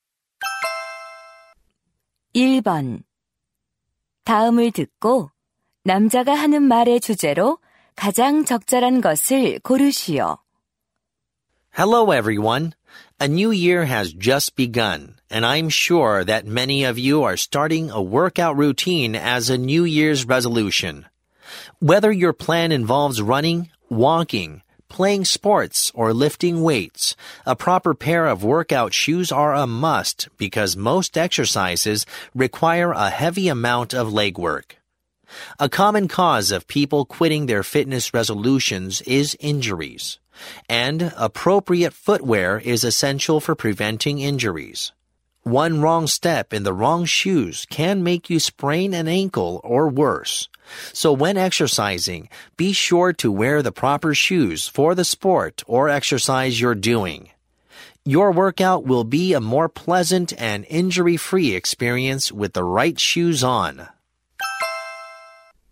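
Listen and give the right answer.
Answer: 운동할 때 알맞은 운동화를 신는 것의 중요성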